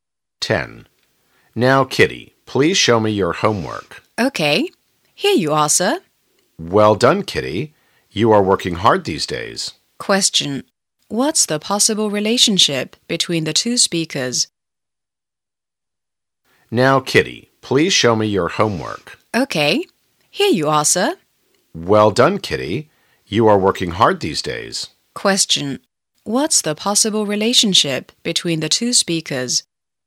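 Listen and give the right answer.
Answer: Teacher and student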